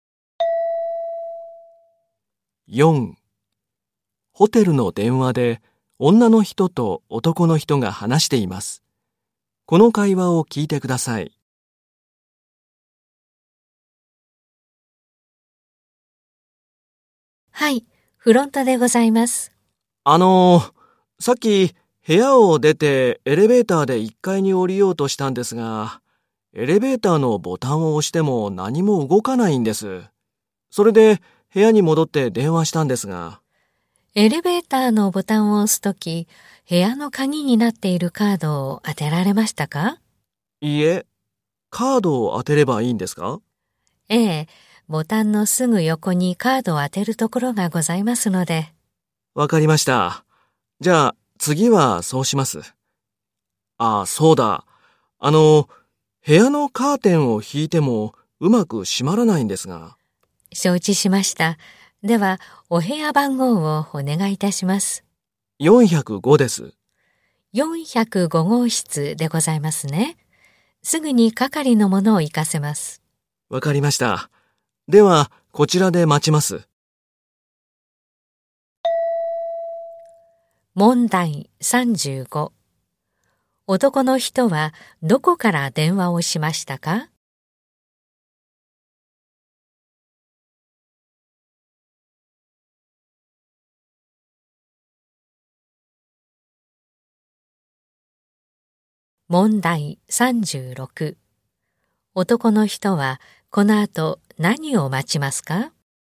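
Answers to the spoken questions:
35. ホテルの部屋(405号室)
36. 係の人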